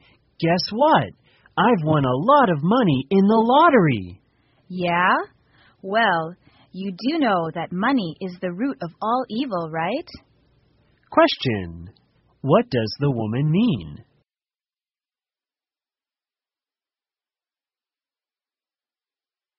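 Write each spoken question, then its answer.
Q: What does the woman mean?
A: Money can bring trouble; winning the lottery isn't necessarily a good thing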